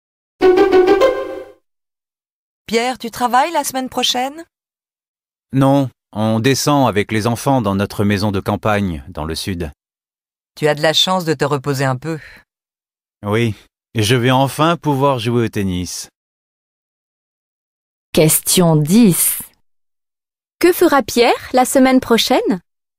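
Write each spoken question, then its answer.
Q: Que fera Pierre la semaine prochaine?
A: Il partira en vacances dans sa maison de campagne et jouera au tennis.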